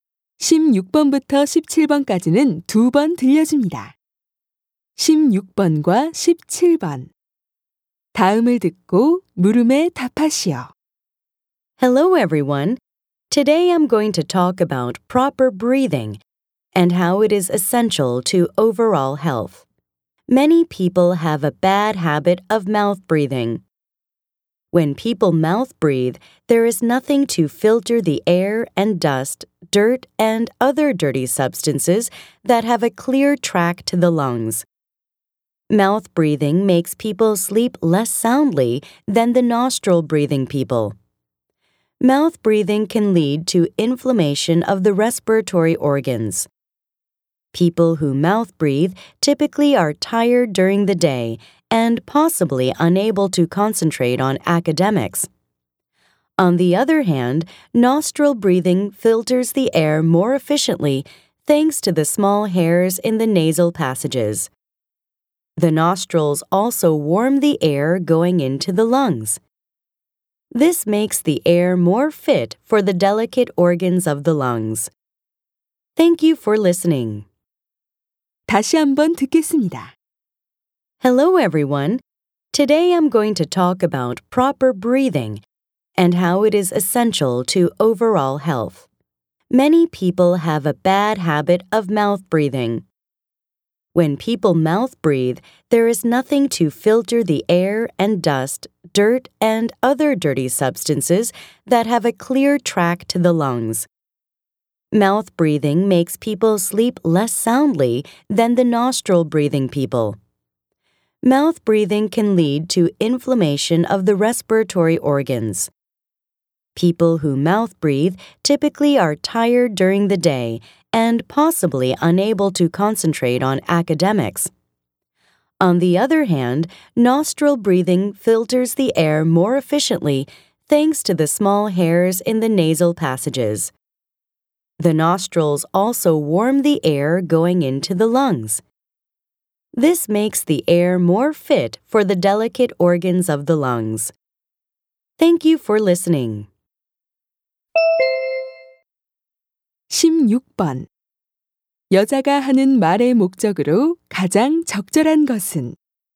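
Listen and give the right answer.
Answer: 입 호흡의 단점과 코 호흡의 장점을 알리려고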